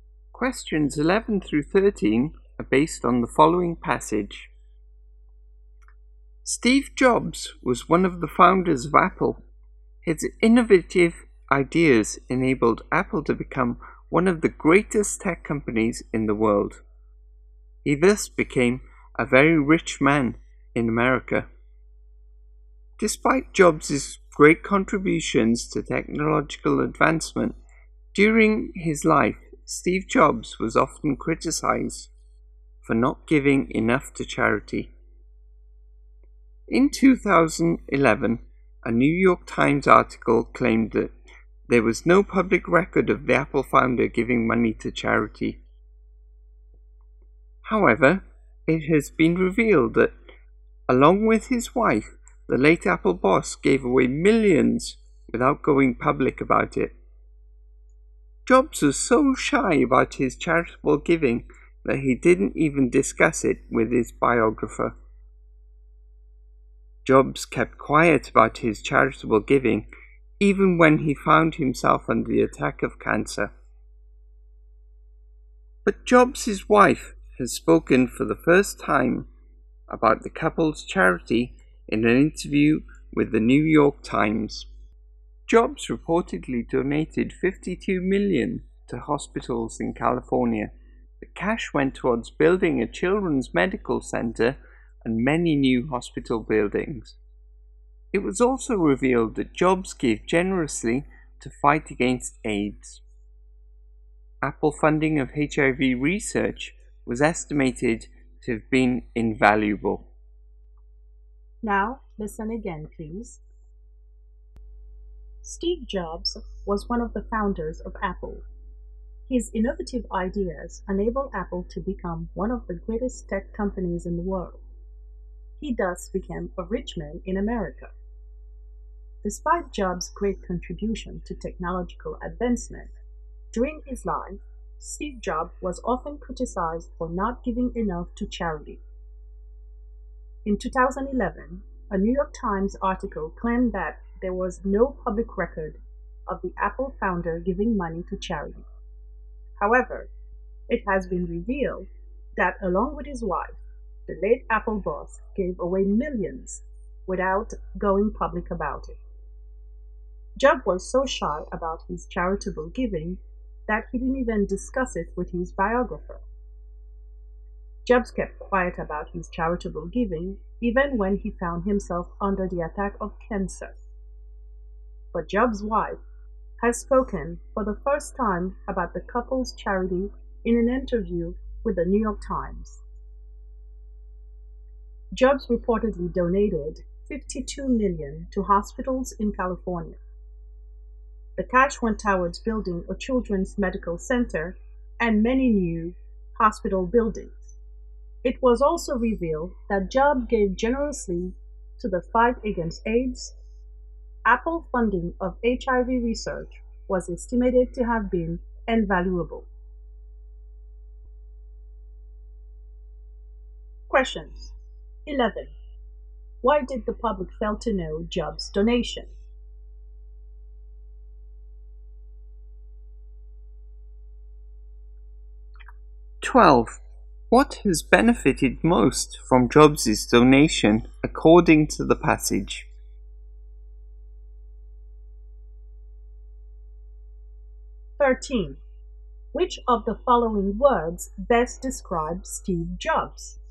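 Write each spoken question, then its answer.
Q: Why did the public fail to know Jobs' donation?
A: Jobs kept quiet about his giving and didn't go public

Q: What has benefited most from Jobs' donation according to the passage?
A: Hospitals in California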